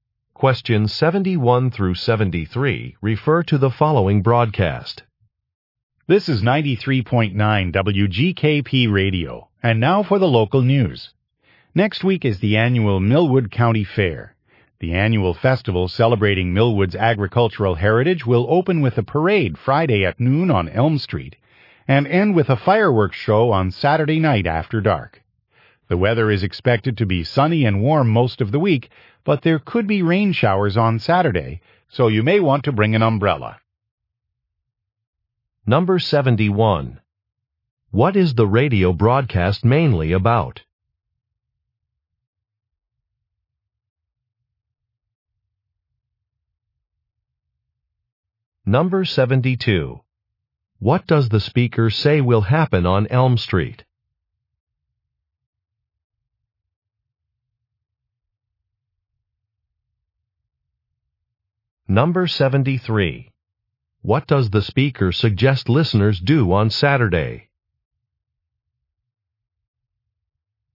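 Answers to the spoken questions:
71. The annual Millwood County Fair
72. A parade
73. Bring an umbrella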